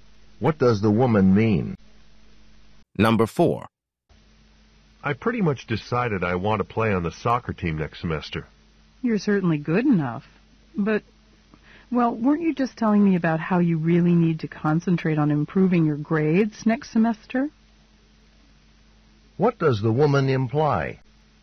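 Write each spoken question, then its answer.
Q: What does the woman imply?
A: Playing soccer might get in the way of improving his grades.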